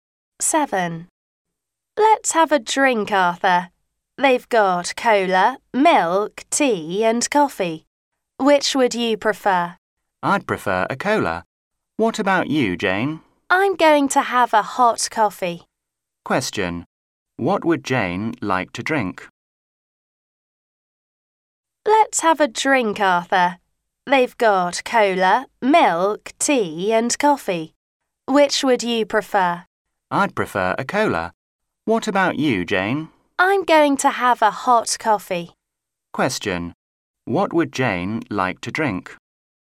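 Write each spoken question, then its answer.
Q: What would Jane like to drink?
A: A hot coffee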